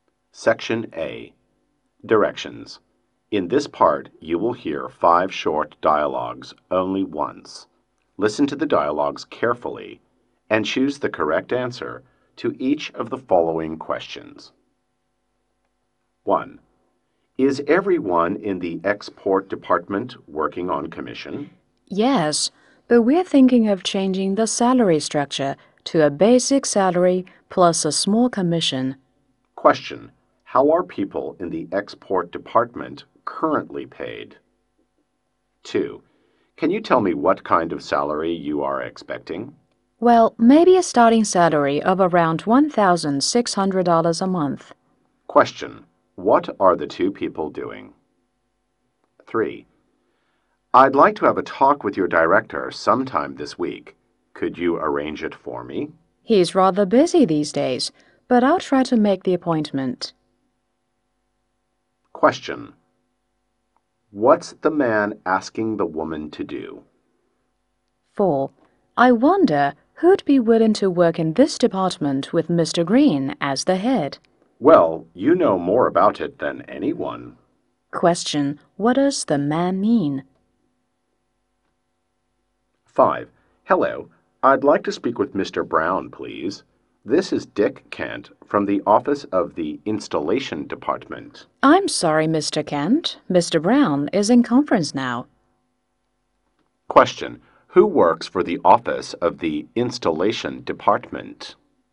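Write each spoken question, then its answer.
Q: How are people in the export department currently paid?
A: On commission only

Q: What are the two people doing?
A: Having a job interview, talking about salary

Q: What's the man asking the woman to do?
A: Arrange an appointment with her director this week

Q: Who works for the office of the installation department?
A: Dick Kent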